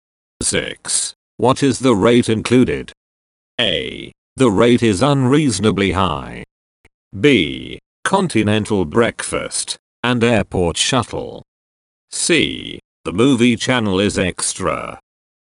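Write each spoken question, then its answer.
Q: What is the rate included?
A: B: Continental breakfast and airport shuttle.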